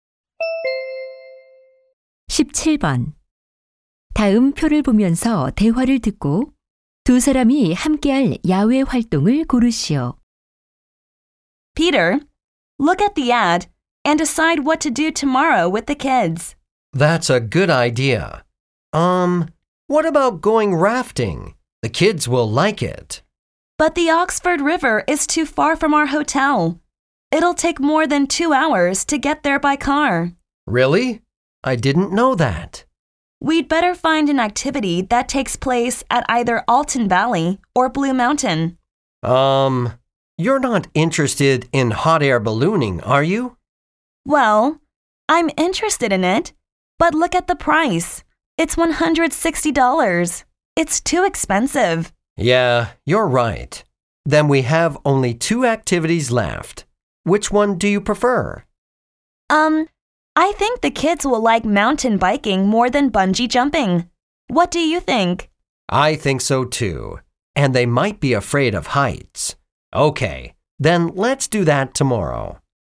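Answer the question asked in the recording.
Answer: 산악자전거 타기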